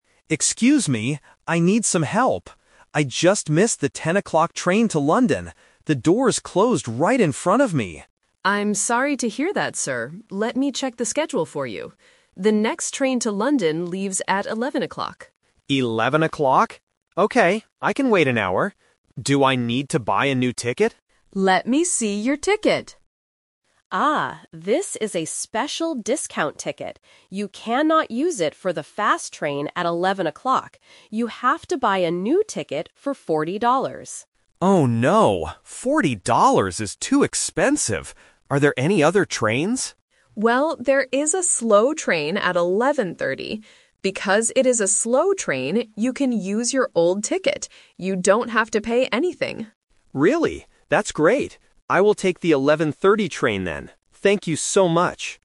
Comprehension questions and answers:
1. Why is the passenger talking to the ticket agent?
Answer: He arrived too late for his train.

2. What is the problem with the 11:00 train?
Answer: The passenger must pay for a new ticket.

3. What time will the passenger leave?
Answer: At 11:30.

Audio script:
Passenger: Excuse me! I need some help. I just missed the 10:00 train to London. The doors closed right in front of me!
Agent: I'm sorry to hear that, sir. Let me check the schedule for you. The next train to London leaves at 11:00.
Passenger: 11:00? Okay, I can wait an hour. Do I need to buy a new ticket?
Agent: Let me see your ticket... Ah, this is a special discount ticket. You cannot use it for the fast train at 11:00. You have to buy a new ticket for 40 dollars.
Passenger: Oh no, 40 dollars is too expensive! Are there any other trains?
Agent: Well, there is a slow train at 11:30. Because it is a slow train, you can use your old ticket. You don't have to pay anything.
Passenger: Really? That's great. I will take the 11:30 train then. Thank you so much!